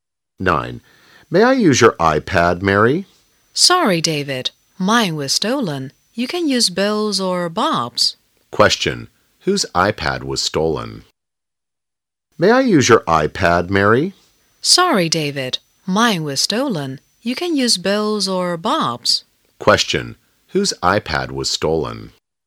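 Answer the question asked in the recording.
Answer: Mary's.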